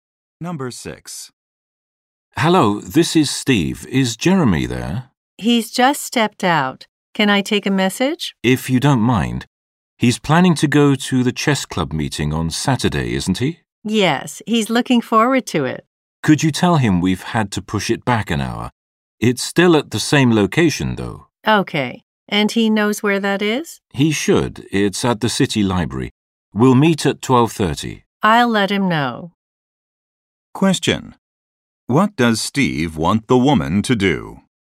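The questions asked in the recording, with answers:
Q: What does Steve want the woman to do?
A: Tell Jeremy that the chess club meeting has been pushed back an hour.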